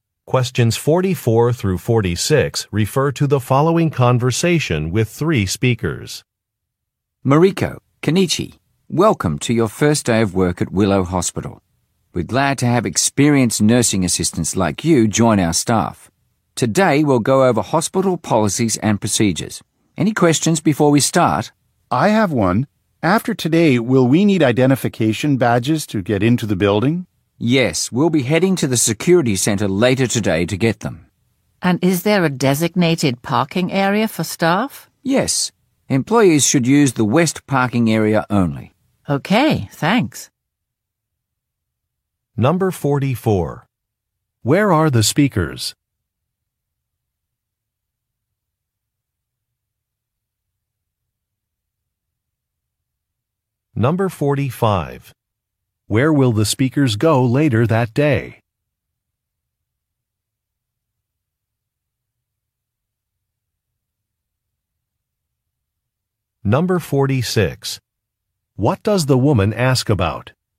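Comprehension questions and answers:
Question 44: Where are the speakers?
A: At a hospital

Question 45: Where will the speakers go later that day?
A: To a security office

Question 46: What does the woman ask about?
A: Where to park a vehicle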